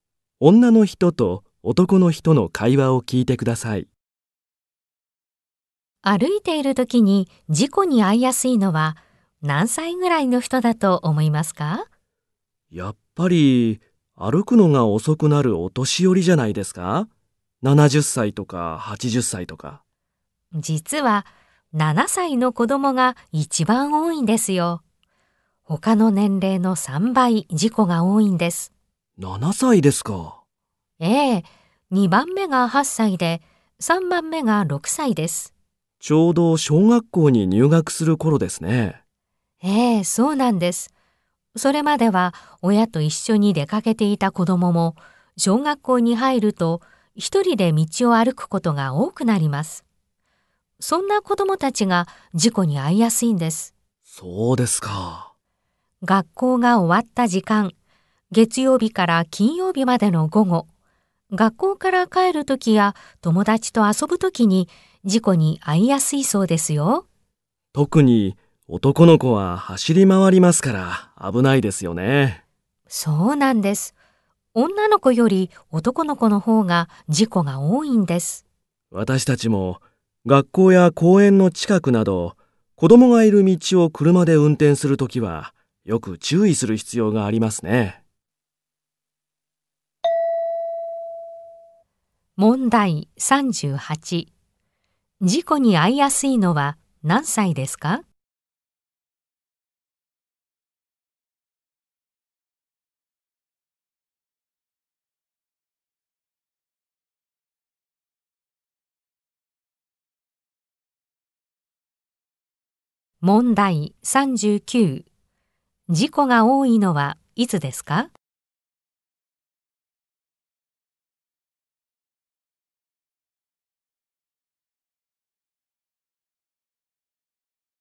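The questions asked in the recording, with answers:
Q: 事故に遭いやすいのは何歳ですか?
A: 7歳

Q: 事故が多いのはいつですか?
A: 月曜日から金曜日の午後、学校が終わった時間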